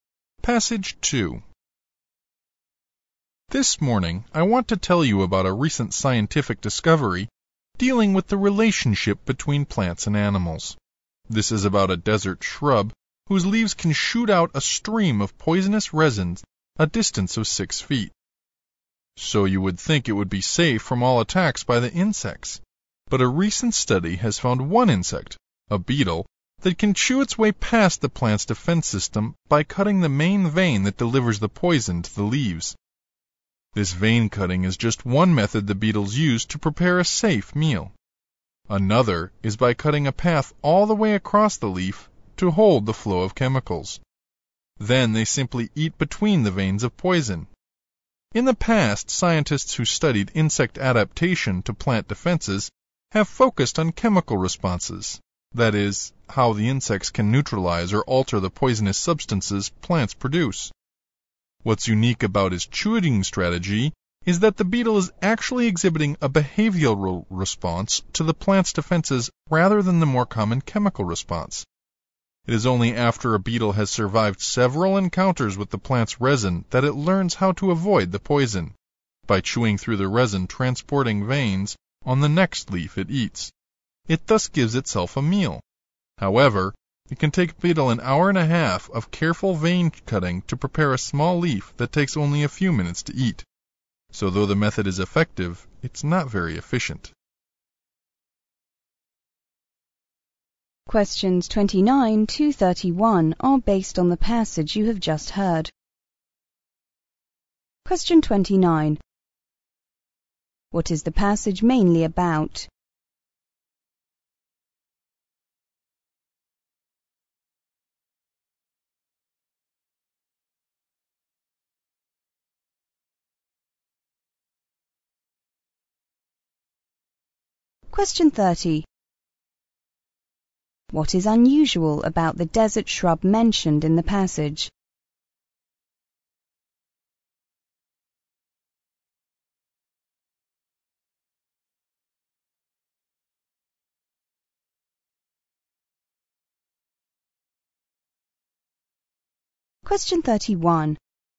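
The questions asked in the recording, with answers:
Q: What is the passage mainly about?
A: How a beetle gets past a desert shrub's poison defense

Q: What is unusual about the desert shrub mentioned in the passage?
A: Its leaves can shoot poisonous resin as far as six feet.

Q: How can the beetles avoid being poisoned by the plant?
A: By cutting the veins that carry the poison to the leaves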